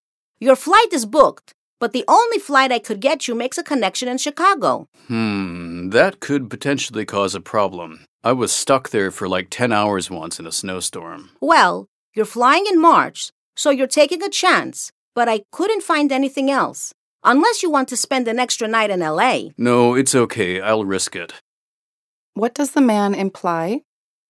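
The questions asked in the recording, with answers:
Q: What does the man imply?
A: He will take the flight through Chicago despite the risk of a snow delay.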